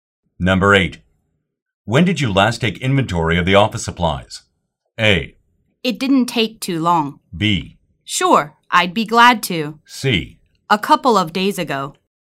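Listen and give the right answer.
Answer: C: A couple of days ago.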